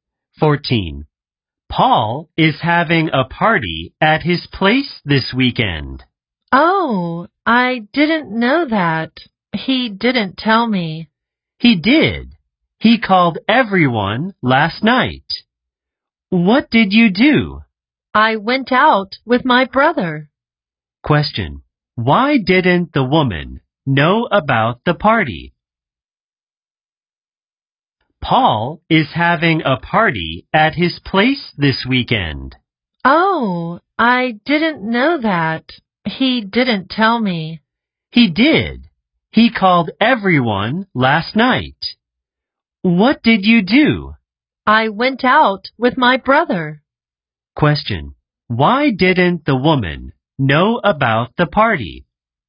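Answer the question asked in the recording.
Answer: She went out with her brother when Paul called everyone.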